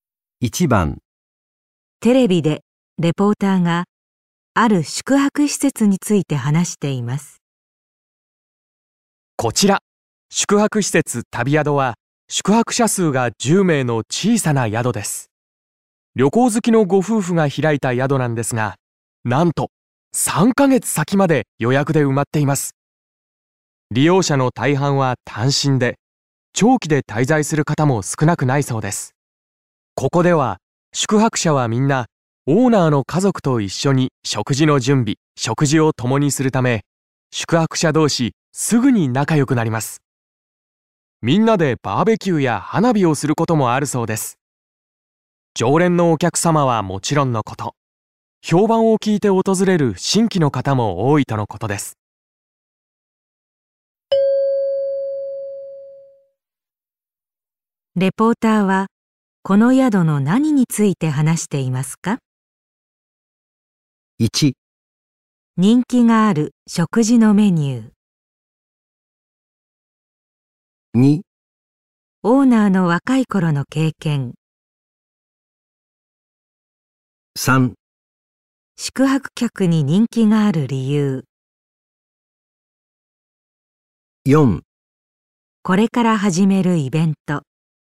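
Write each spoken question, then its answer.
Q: レポーターはこの宿の何について話していますか?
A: 3: 宿泊客に人気がある理由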